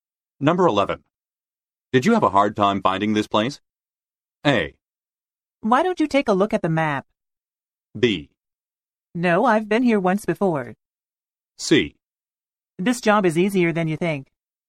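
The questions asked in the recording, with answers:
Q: Did you have a hard time finding this place?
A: B: No, I've been here once before.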